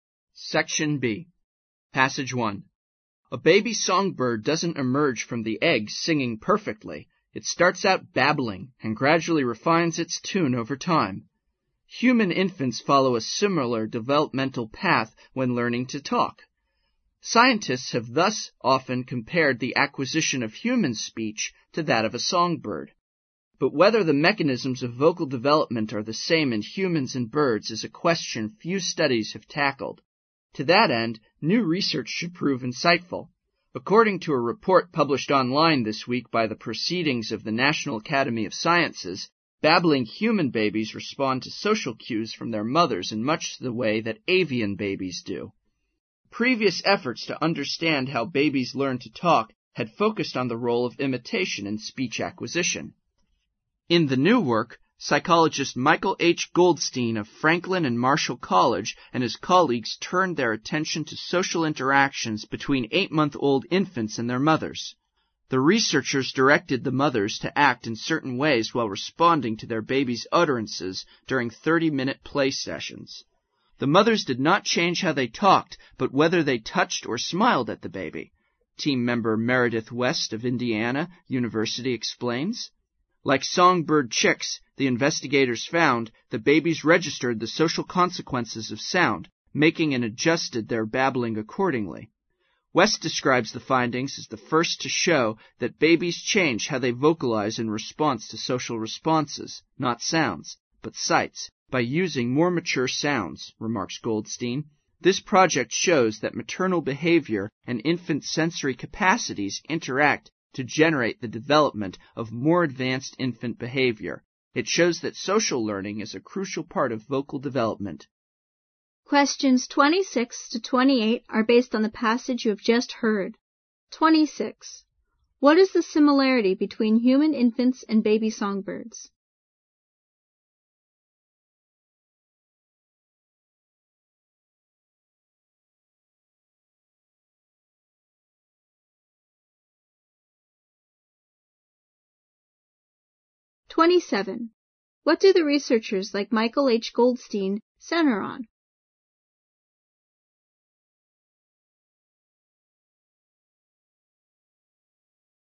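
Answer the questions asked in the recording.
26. Both start by babbling and gradually refine their sounds over time.
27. Social interactions between babies and their mothers.
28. Social learning.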